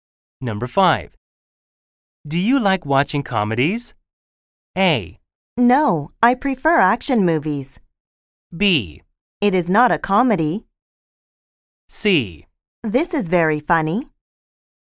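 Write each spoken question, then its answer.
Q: Do you like watching comedies?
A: A: No, I prefer action movies.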